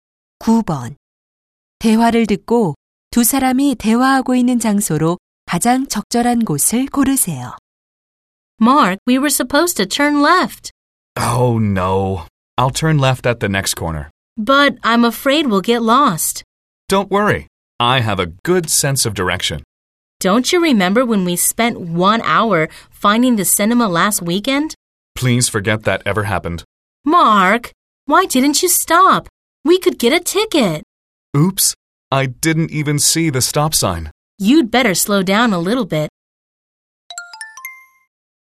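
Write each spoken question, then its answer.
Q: 대화를 듣고 두 사람이 대화하고 있는 장소로 가장 적절한 곳을 고르세요.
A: 자동차 안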